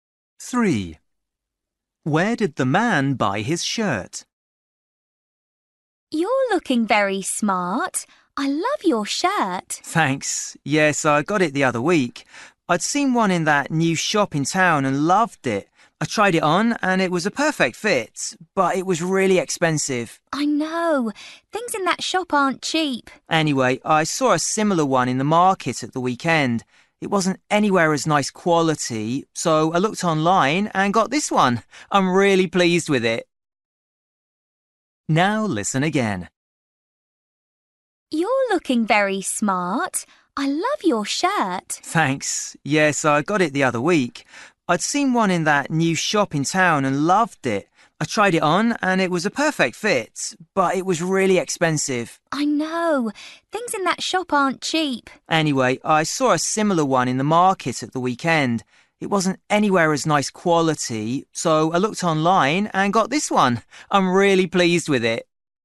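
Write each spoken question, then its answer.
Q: Where did the man buy his shirt?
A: Online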